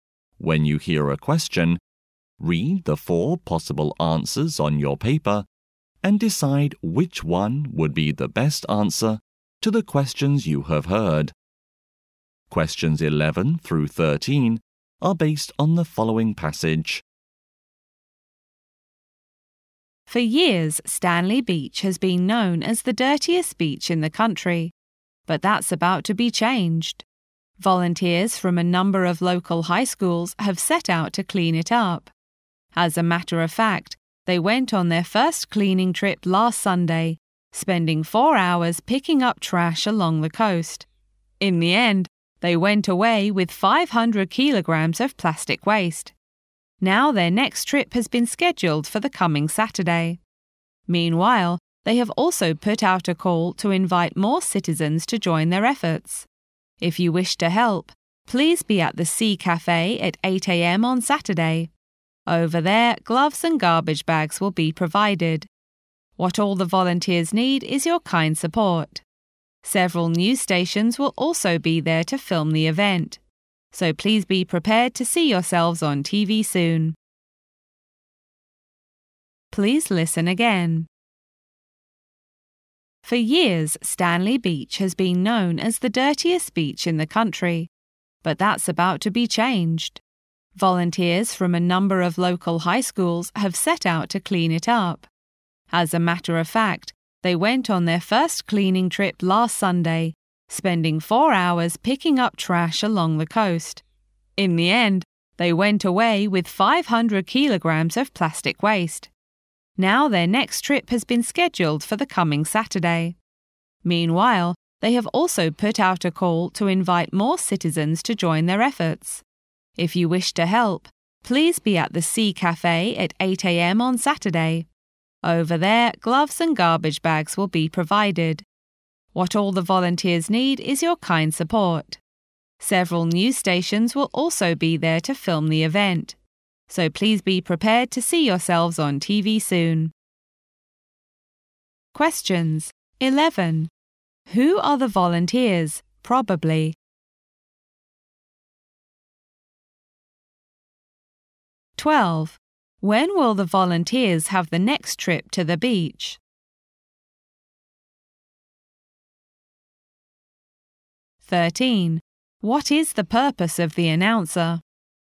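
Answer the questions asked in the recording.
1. High school students
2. This coming Saturday
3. To invite more people to help clean up the beach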